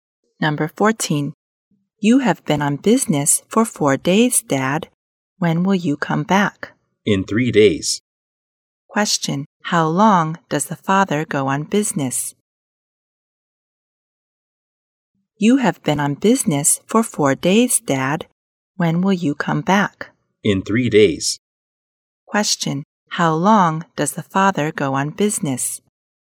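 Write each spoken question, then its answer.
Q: How long does the father go on business?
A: 7 days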